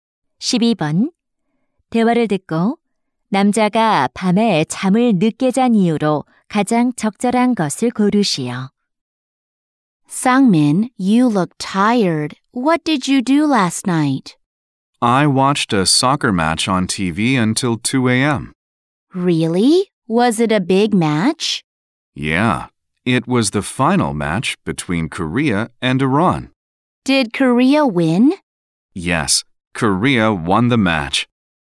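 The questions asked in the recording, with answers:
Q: 대화를 듣고 남자가 밤에 잠을 늦게 잔 이유로 가장 적절한 것을 고르시오.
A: TV로 축구 경기를 봐서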